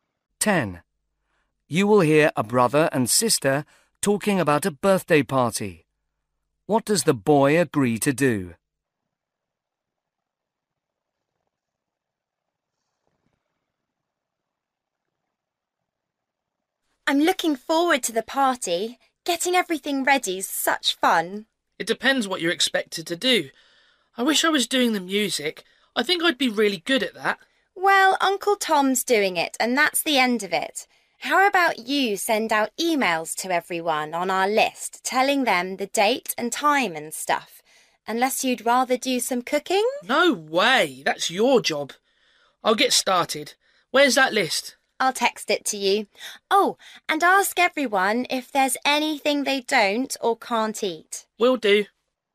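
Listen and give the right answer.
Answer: Send emails to the guests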